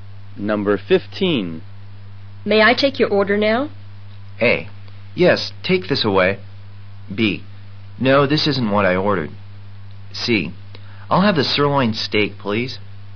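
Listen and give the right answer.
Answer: C: I'll have the sirloin steak, please.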